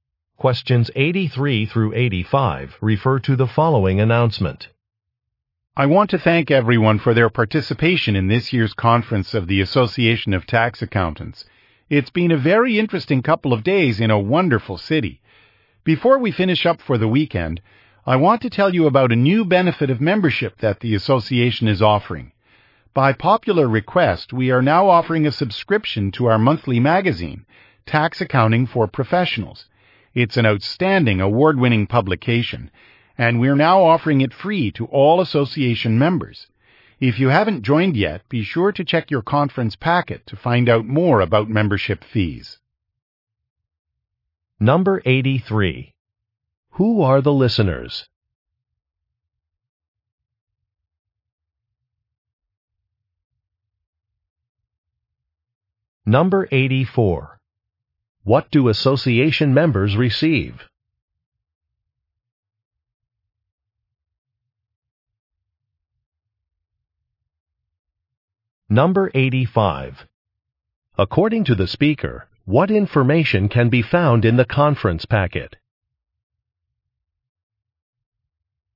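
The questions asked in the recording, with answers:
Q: Who are the listeners?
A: Tax accountants

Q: What do association members receive?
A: A free magazine subscription

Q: According to the speaker, what information can be found in the conference packet?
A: Membership fees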